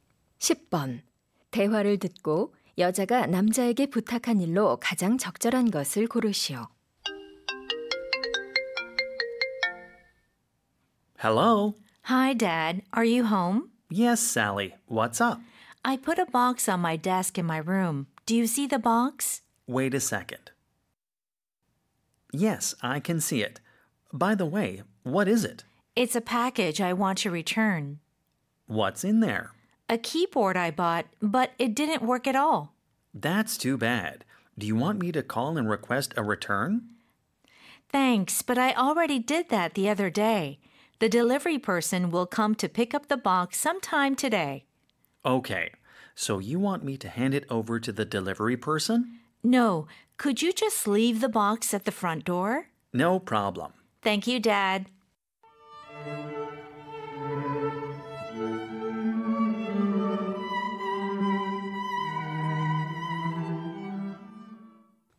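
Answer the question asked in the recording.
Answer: 반품할 상자를 현관문 앞에 놓아두기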